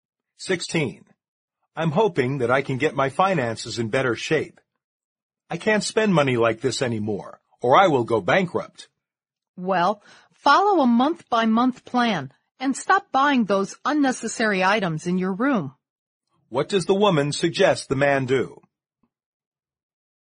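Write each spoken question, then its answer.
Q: What does the woman suggest the man do?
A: Follow a monthly budget plan and stop buying unnecessary things.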